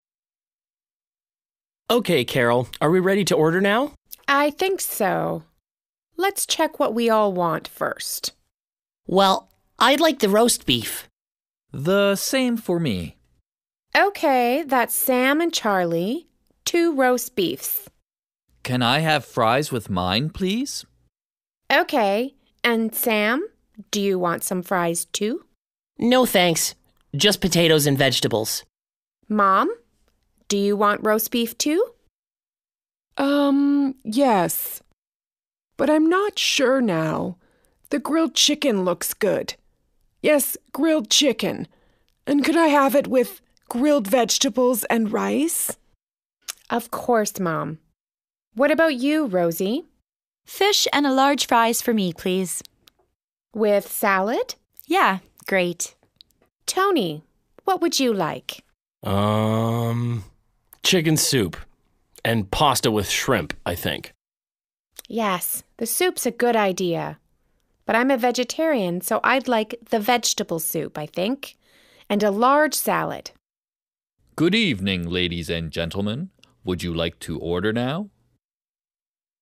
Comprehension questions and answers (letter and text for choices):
1. Listen to the conversation in a restaurant. Match the people with the food. You don't need all the food items.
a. Roast beef and fries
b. Vegetable soup and large salad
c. Chicken soup, pasta and shrimp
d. Pasta with grilled vegetables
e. Green beans and carrots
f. Roast beef, potatoes and vegetables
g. Grilled chicken, vegetables and rice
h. Fish and fries with salad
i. Pasta and salad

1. Charlie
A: a. Roast beef and fries

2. Sam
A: f. Roast beef, potatoes and vegetables

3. Mom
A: g. Grilled chicken, vegetables and rice

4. Rosie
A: h. Fish and fries with salad

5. Tony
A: c. Chicken soup, pasta and shrimp

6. Carol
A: b. Vegetable soup and large salad